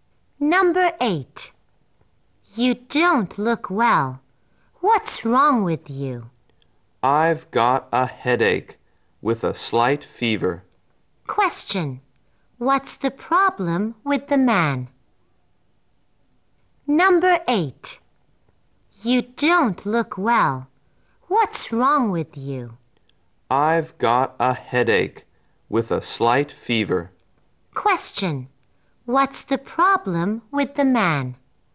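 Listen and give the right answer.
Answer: He has a headache with a slight fever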